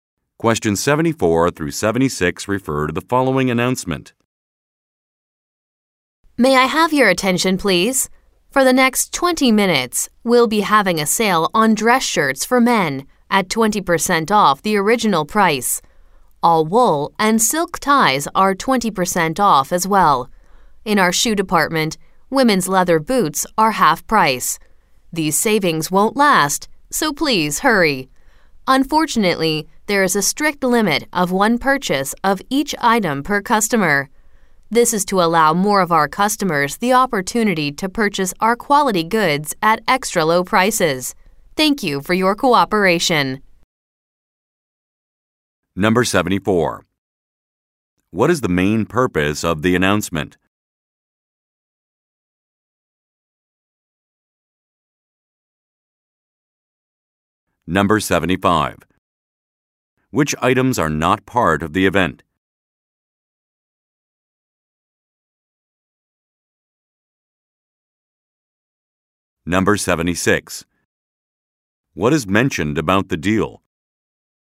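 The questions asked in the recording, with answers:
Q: What is the main purpose of the announcement?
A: To announce a limited-time sale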